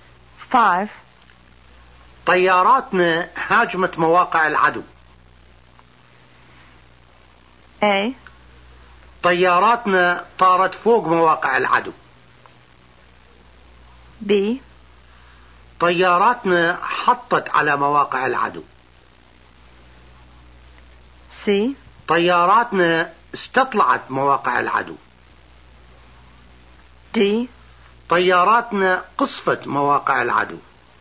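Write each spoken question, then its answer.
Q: طياراتنا هاجمت مواقع العدو.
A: D: طياراتنا قصفت مواقع العدو.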